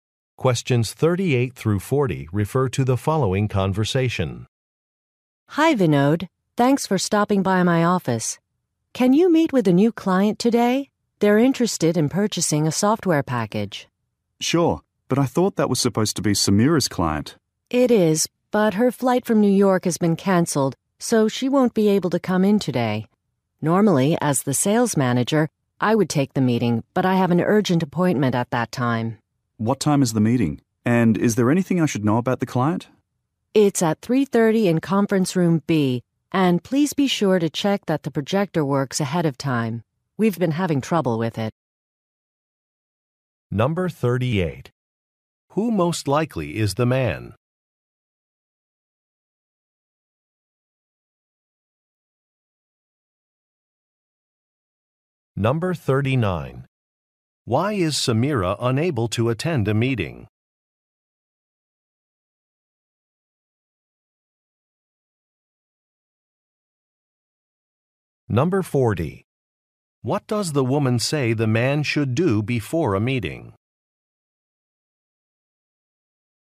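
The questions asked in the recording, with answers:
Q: Why is Samira unable to attend a meeting?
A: Her flight was canceled

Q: What does the woman say the man should do before a meeting?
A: Check that the projector works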